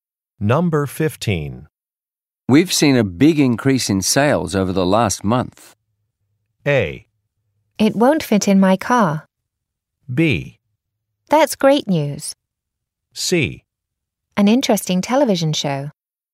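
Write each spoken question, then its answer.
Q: We've seen a big increase in sales over the last month.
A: B: That's great news.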